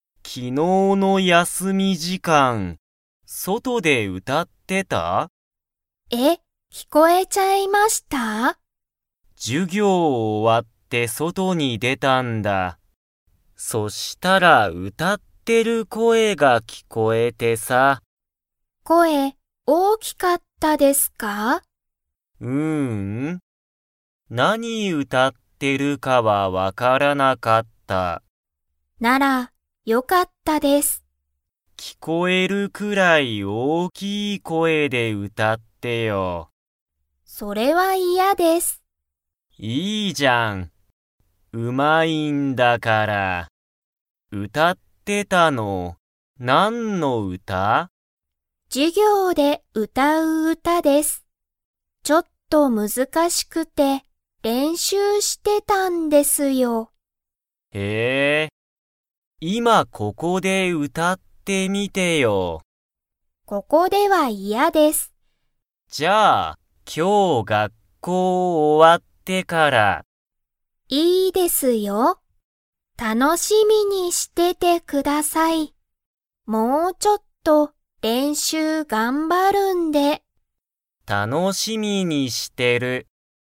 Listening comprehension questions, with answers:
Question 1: 昨日きのうの休やすみ時間じかん、ゆきえは何なにをしてましたか?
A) 勉強べんきょうしてた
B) 遊あそんでた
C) 歌うたってた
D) 笑わらってた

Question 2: ゆきえは今いまここで 。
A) 歌うたう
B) 歌うたわない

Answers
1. C
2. B

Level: Level 3

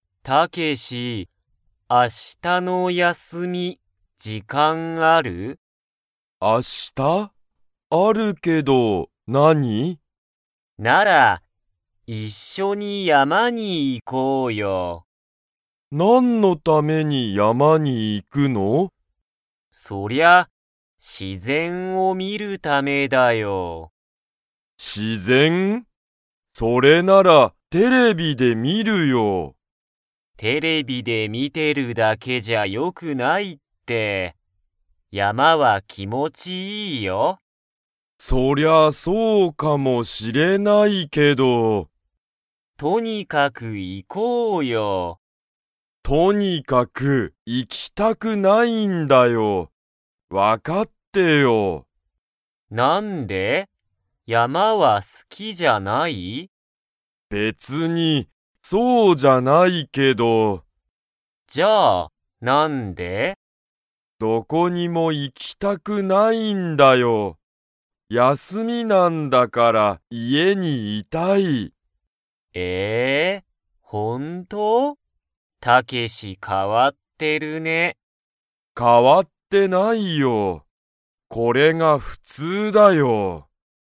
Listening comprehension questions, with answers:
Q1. タロウは、____を見(み)るために、山(やま)に行(い)きたい。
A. テレビ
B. 本(ほん)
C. 家(いえ)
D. 自然(しぜん)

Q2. タケシは山(やま)に行(い)きたいですか?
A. はい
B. いいえ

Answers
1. D
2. B

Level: Level 2

